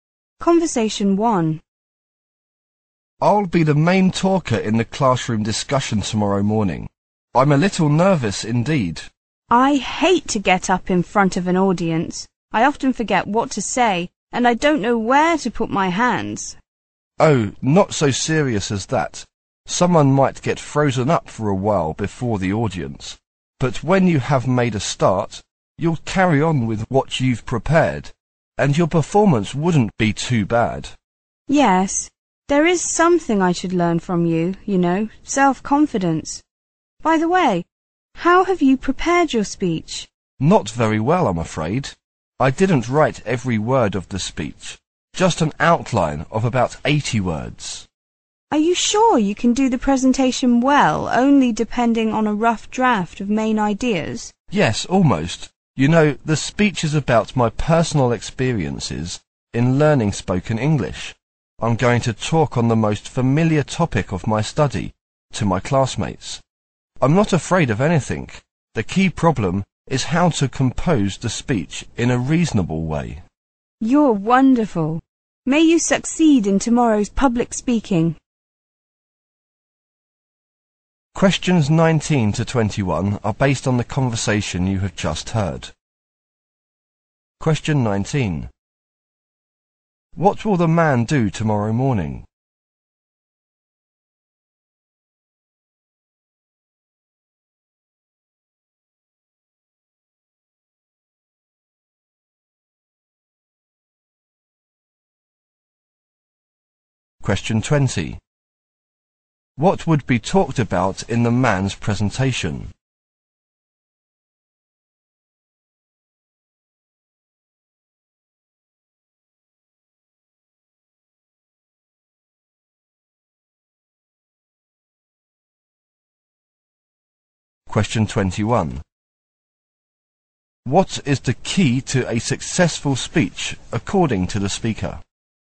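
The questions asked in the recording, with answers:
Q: What will the man do tomorrow morning?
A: Give a speech as the main talker in a classroom discussion

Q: What would be talked about in the man's presentation?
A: His personal experiences in learning spoken English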